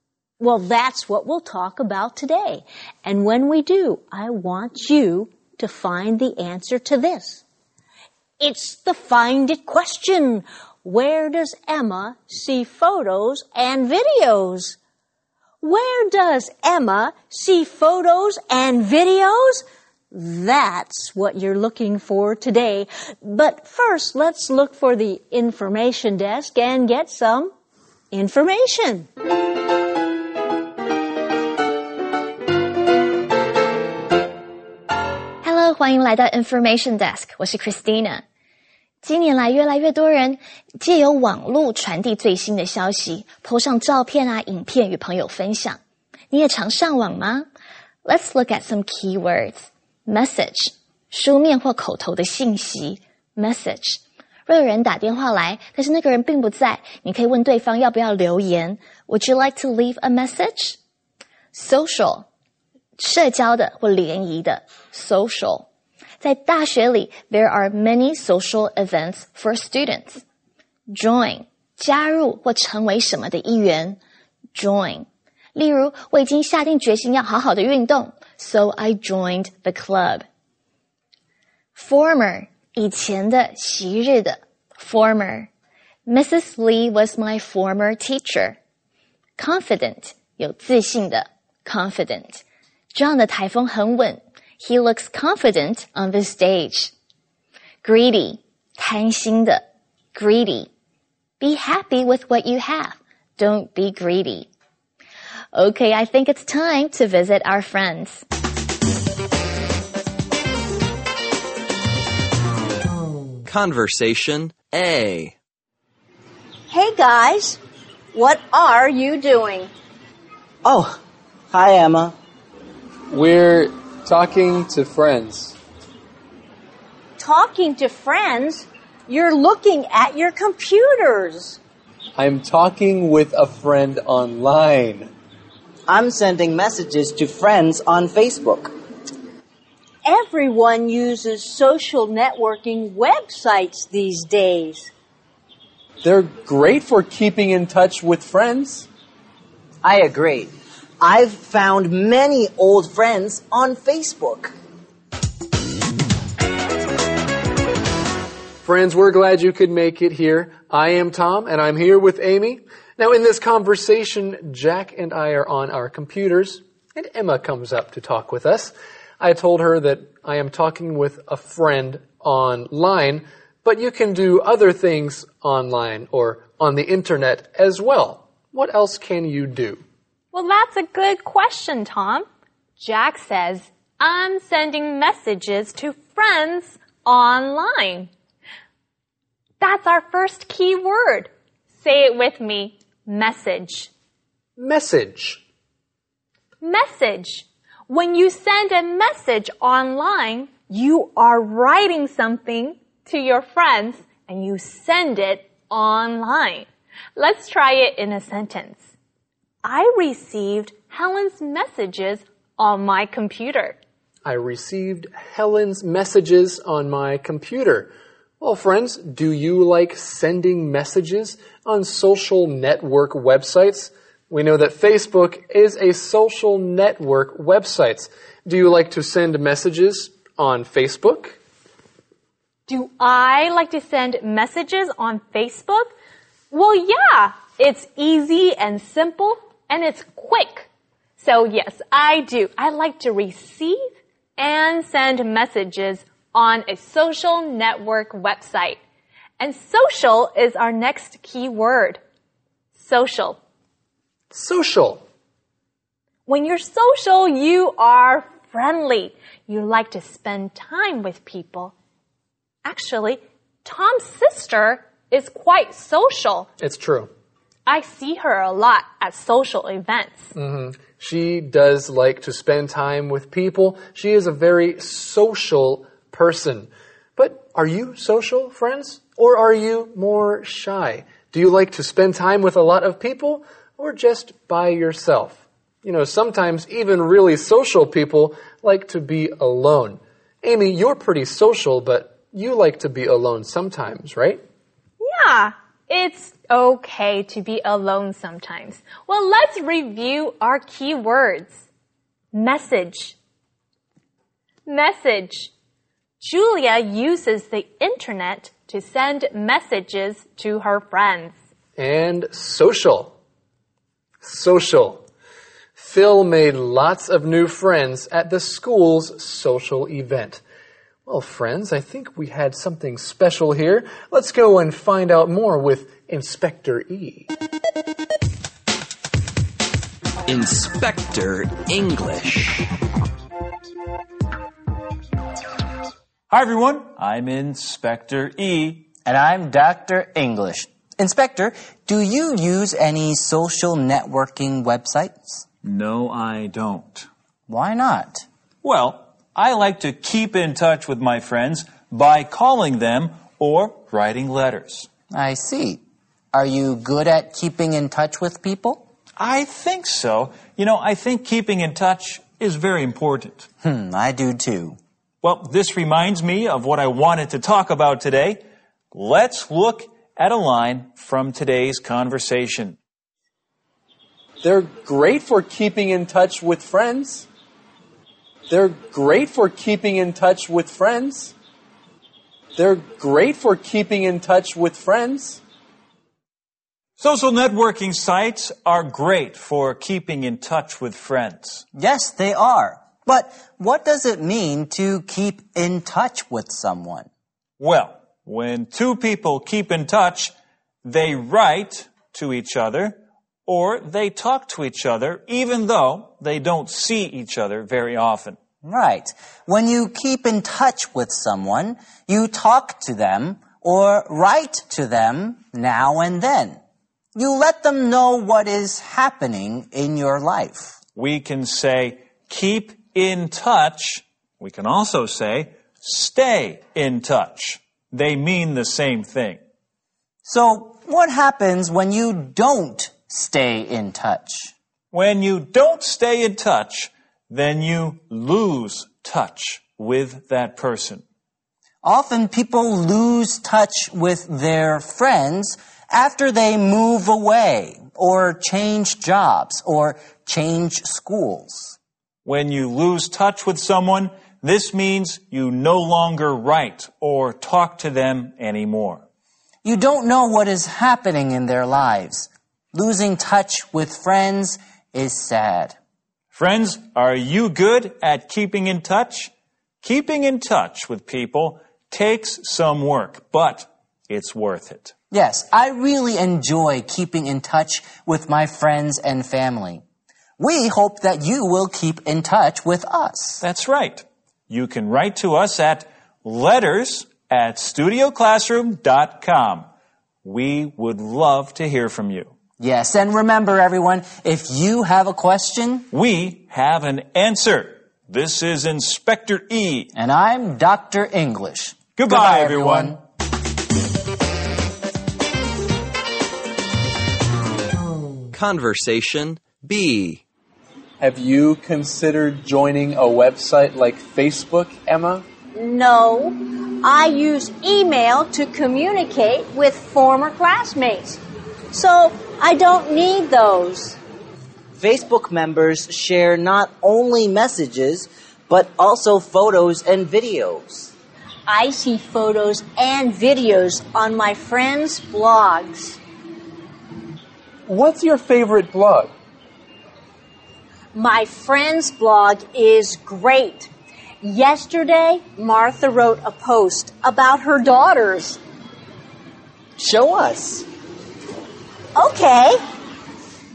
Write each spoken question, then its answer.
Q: Where does Emma see photos and videos?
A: Well, she sees photos and videos on her friends' blogs.